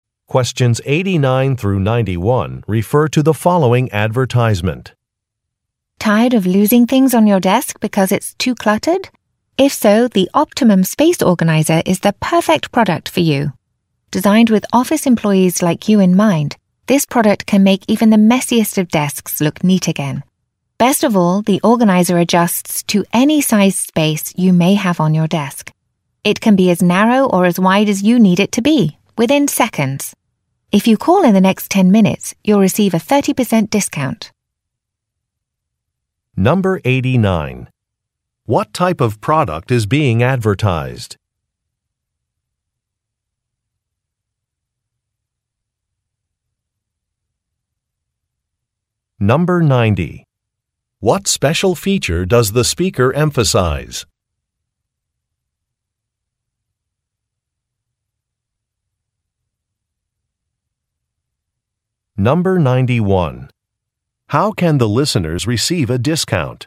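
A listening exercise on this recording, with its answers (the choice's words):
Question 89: What type of product is being advertised?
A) A floor lamp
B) A bookshelf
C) An office chair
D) A desk organizer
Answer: A desk organizer

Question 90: What special feature does the speaker emphasize?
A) It is durable.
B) It is adjustable.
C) It is easy to assemble.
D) It is available in many colors.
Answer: It is adjustable.

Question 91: How can the listeners receive a discount?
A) By calling within a time limit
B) By entering an e-mail address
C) By referring a product to a friend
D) By using a mobile phone application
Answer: By calling within a time limit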